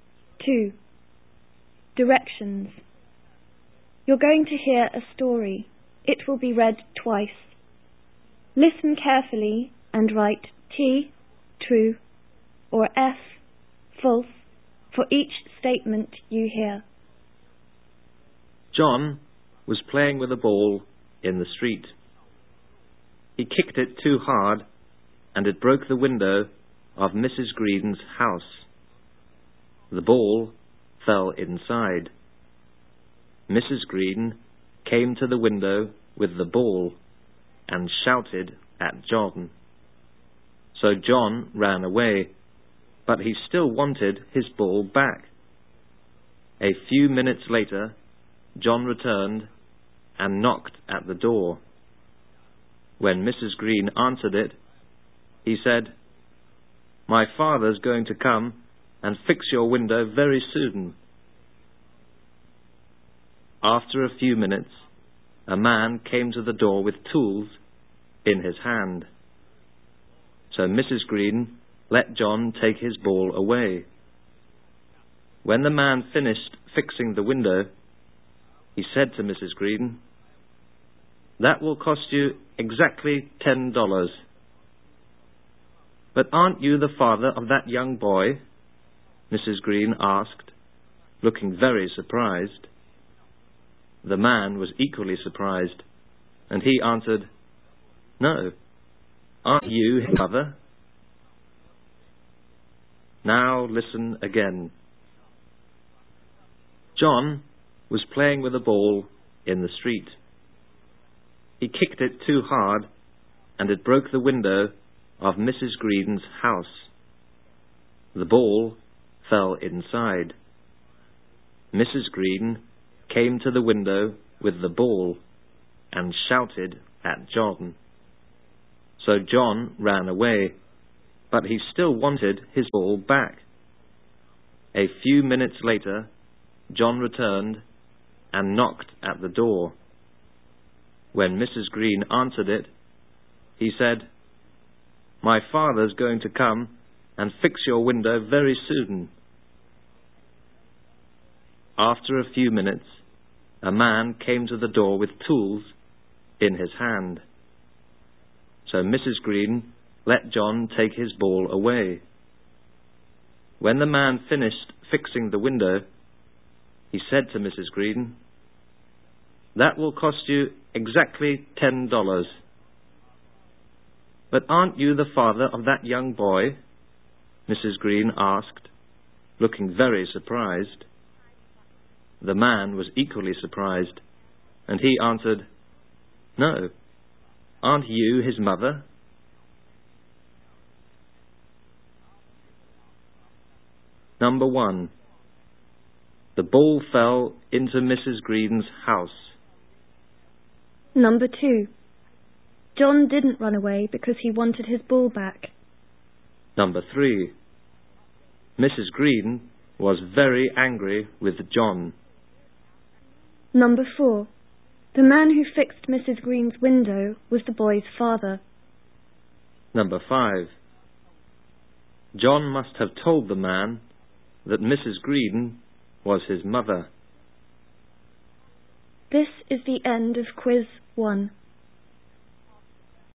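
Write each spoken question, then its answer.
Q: The ball fell into Mrs. Green's house.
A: True

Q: John didn't run away because he wanted his ball back.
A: False

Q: Mrs. Green was very angry with John.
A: True

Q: The man who fixed Mrs. Green's window was the boy's father.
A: False

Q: John must have told the man that Mrs. Green was his mother.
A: True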